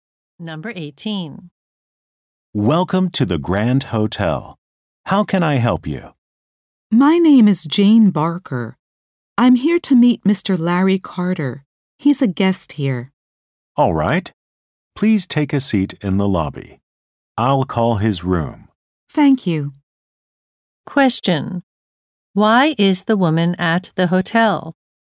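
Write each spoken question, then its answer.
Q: Why is the woman at the hotel?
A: To meet a guest, Mr. Larry Carter.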